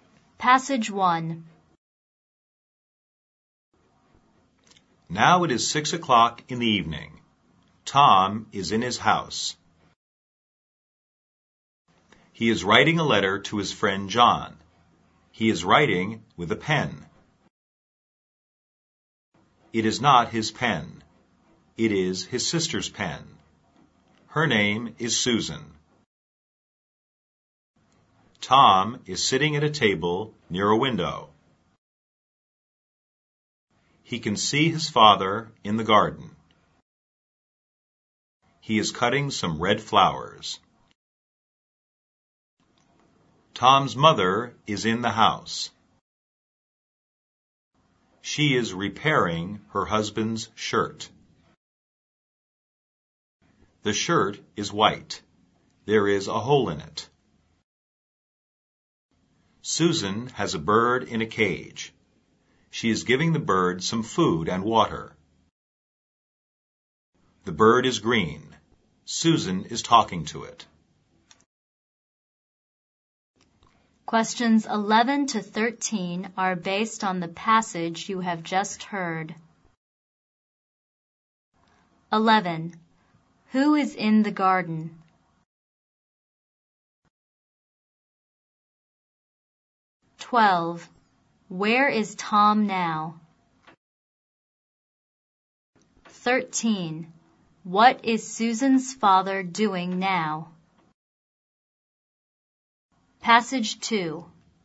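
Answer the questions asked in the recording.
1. Tom's father
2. In his house, at a table near a window
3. Cutting some red flowers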